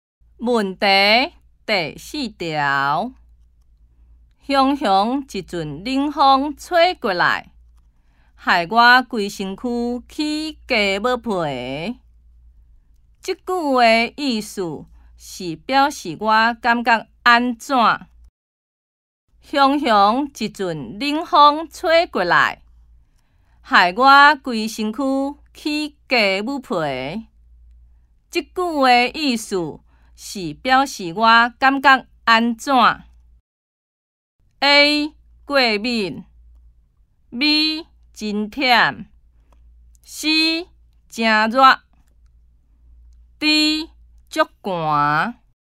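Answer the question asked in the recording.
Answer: D: 足寒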